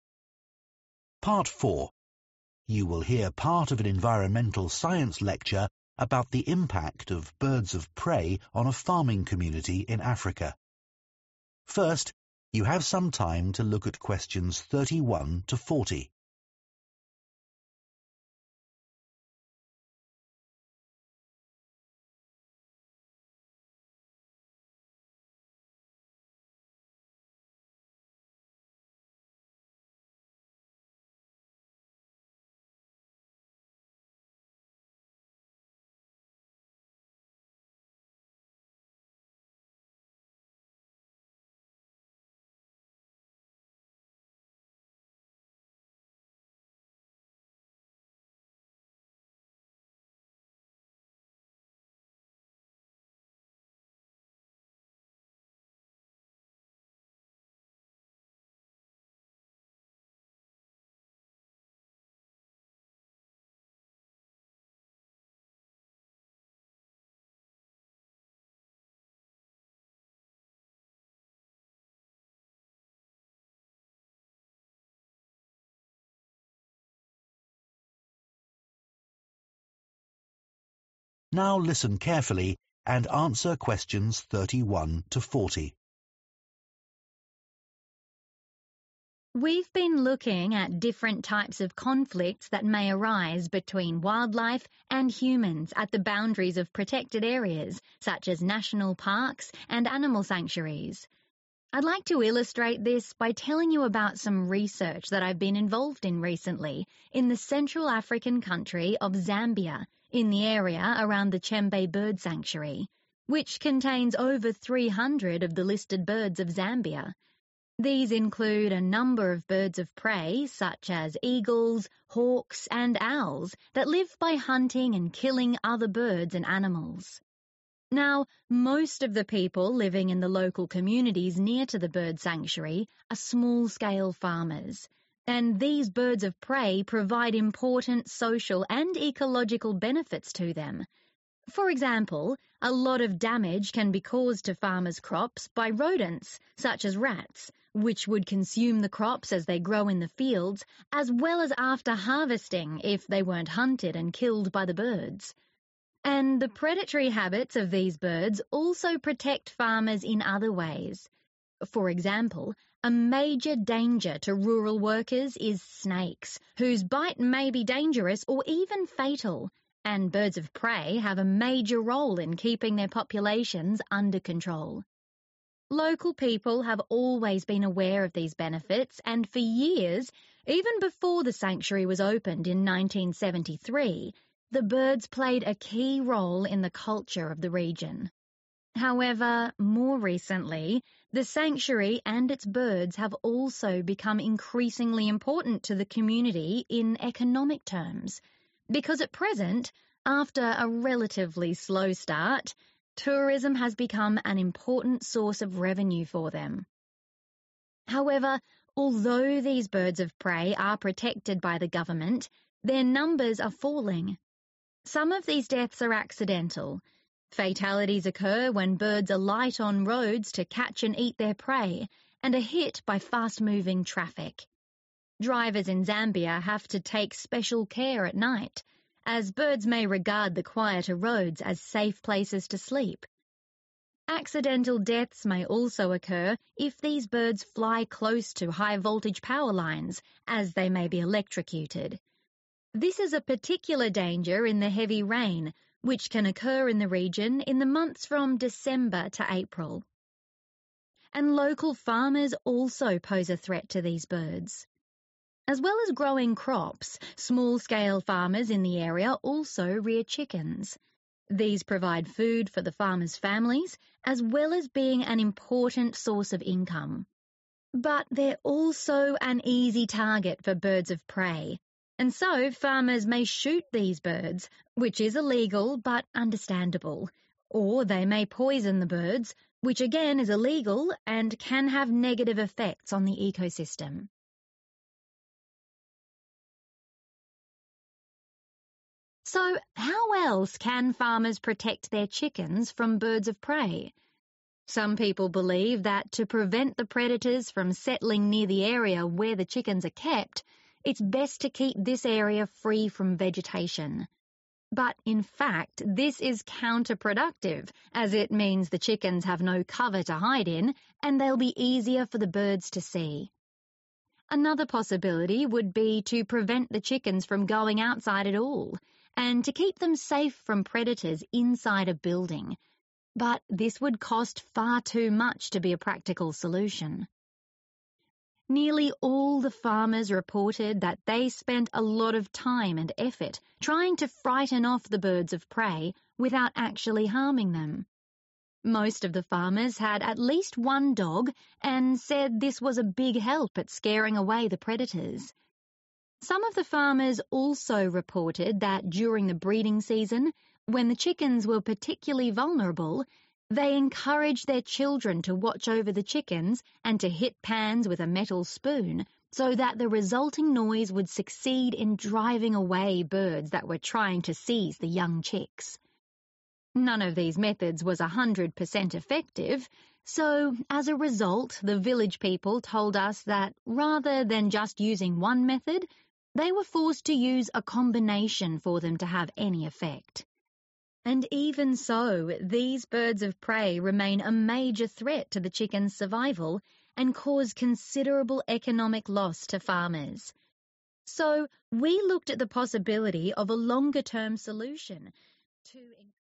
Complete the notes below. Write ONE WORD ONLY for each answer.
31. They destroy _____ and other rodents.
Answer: rats

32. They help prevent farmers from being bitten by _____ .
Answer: snakes

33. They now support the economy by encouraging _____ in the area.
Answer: tourism

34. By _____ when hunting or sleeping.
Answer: traffic

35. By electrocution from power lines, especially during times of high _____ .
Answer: rain

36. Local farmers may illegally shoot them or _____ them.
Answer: poison

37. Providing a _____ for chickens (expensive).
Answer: building

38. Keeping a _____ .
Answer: dog

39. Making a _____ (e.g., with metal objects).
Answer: noise

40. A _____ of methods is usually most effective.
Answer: combination

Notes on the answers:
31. The correct answer is 'rats' because the transcript states that birds of prey, like eagles and hawks, help farmers by hunting and killing animals that damage crops, such as rats. These birds protect the farmers' crops from being eaten by these rodents.
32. The correct answer is 'snakes' because the transcript mentions that birds of prey help protect farmers from snakes. The death from snakes can be dangerous or even fatal, so the presence of birds that keep snakes under control is important for the safety of the farmers.
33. The correct answer is 'tourism' because the transcript mentions that tourism has become an important source of money for the local communities around the Chembe Bird Sanctuary. This shows that birds of prey not only provide ecological benefits but also help people economically through attracting visitors.
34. The correct answer is 'traffic' because in the transcript, it says that birds can get killed by being hit by fast moving traffic when they come down to the roads to hunt or sleep. This describes how the presence of cars and other vehicles can cause accidental deaths to birds of prey.
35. The correct answer is 'rain' because the transcript mentions that birds of prey can be electrocuted when they fly close to high power lines. This danger is especially high during heavy rain, which occurs from December to April in the region. So, rain is linked to the risk of birds getting electrocuted.
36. The correct answer is 'poison' because local farmers sometimes kill birds of prey that threaten their chickens. This is illegal, but farmers feel they have to protect their chickens. They may use poison for this purpose, which can harm not just the birds but also the environment. The information in the transcript points out that poisoning these birds happens even though it's wrong and can have negative effects on the ecosystem.
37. The correct answer is 'building' because in the transcript, it is mentioned that one of the options to protect chickens from birds of prey is to keep them safe inside a building. However, this solution is said to be very expensive and not practical for the farmers.
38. The correct answer is 'dog' because many farmers said that having a dog was a big help in frightening away the birds of prey that threaten their chickens.
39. The correct answer is 'noise' because in the transcript, it mentions that farmers use noise, such as hitting pans with a metal spoon, to scare away the birds that might try to take their chickens.
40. The correct answer is 'combination' because the farmers said that no single method worked perfectly to protect their chickens from birds of prey. They had to use many different methods together to be more effective.

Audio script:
We've been looking at different types of conflicts that may arise between wildlife and humans at the boundaries of protected areas, such as national parks and animal sanctuaries. I'd like to illustrate this by telling you about some research that I've been involved in recently in the Central African country of Zambia in the area around the Chembe Bird Sanctuary which contains over 300 of the listed birds of Zambia These include a number of birds of prey such as eagles hawks and owls that live by hunting and killing other birds and animals Now most of the people living in the local communities near to the bird sanctuary are small-scale farmers and these birds of prey provide important social and ecological benefits to them. For example, a lot of damage can be caused to farmers' crops by rodents, such as rats, which would consume the crops as they grow in the fields, as well as after harvesting if they weren't hunted and killed by the birds. And the predatory habits of these birds also protect farmers in other ways. For example, a major danger to rural workers is snakes, whose bite may be dangerous or even fatal, and birds of prey have a major role in keeping their populations under control. Local people have always been aware of these benefits and for years, even before the sanctuary was opened in 1973, the birds played a key role in the culture of the region. However, more recently, the sanctuary and its birds have also become increasingly important to the community in economic terms, because at present, after a relatively slow start, tourism has become an important source of revenue for them. However, although these birds of prey are protected by the government, their numbers are falling. Some of these deaths are accidental. Fatalities occur when birds alight on roads to catch and eat their prey, and are hit by fast moving traffic. Drivers in Zambia have to take special care at night, as birds may regard the quieter roads as safe places to sleep. Accidental deaths may also occur if these birds fly close to high power lines as they may be electrocuted. This is a particular danger in the heavy rain which can occur in the region in the months from December to April. And local farmers also pose a threat to these birds. As well as growing crops, small-scale farmers in the area also rear chickens.
These provide food for the farmers' families, as well as being an important source of income. But they're also an easy target for birds of prey, and so farmers may shoot these birds, which is illegal but understandable, or they may poison the birds, which again is illegal and can have negative effects on the ecosystem. So how else can farmers protect their chickens from birds of prey? Some people believe that to prevent the predators from settling near the area where the chickens are kept, it's best to keep this area free from vegetation. But in fact, this is counterproductive, as it means the chickens have no cover to hide in and they'll be easier for the birds to see. Another possibility would be to prevent the chickens from going outside at all and to keep them safe from predators inside a building, but this would cost far too much to be a practical solution. Nearly all the farmers reported that they spent a lot of time and effort trying to frighten off the birds of prey without actually harming them. Most of the farmers had at least one dog and said this was a big help at scaring away the predators. Some of the farmers also reported that during the breeding season, when the chickens were particularly vulnerable, they encouraged their children to watch over the chickens and to hit pans with a metal spoon so that the resulting noise would succeed in driving away birds that were trying to seize the young chicks None of these methods was 100% effective so as a result the village people told us that rather than just using one method, they were forced to use a combination for them to have any effect. And even so, these birds of prey remain a major threat to the chickens' survival and cause considerable economic loss to farmers. So we looked at the possibility of a longer-term solution to...